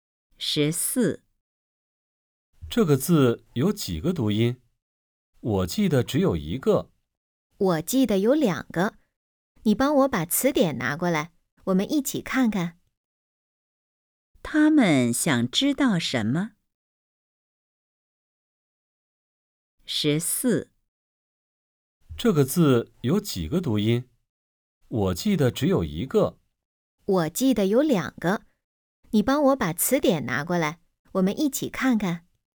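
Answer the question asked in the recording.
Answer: 这个字有几个读音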